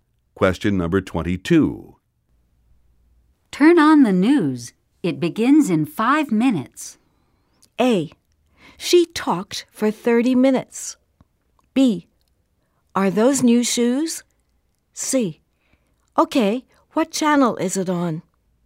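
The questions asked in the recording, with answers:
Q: Turn on the news. It begins in 5 minutes.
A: C: Okay. What channel is it on?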